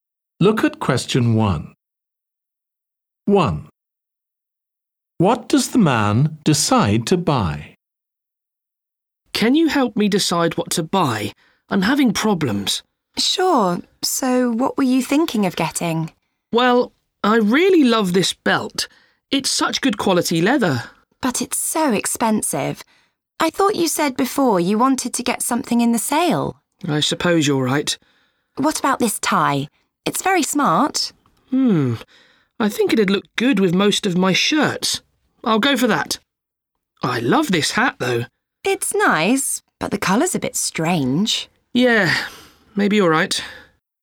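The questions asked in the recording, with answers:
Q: What does the man decide to buy?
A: a tie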